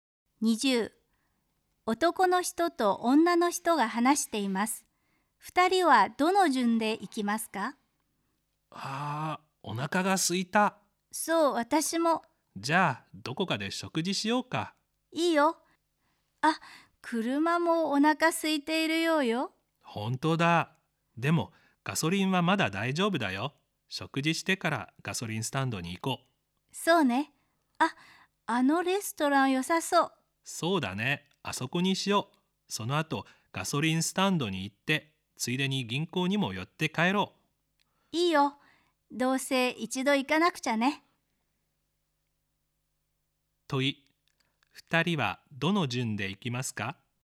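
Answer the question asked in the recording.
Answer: レストラン、ガソリンスタンド、銀行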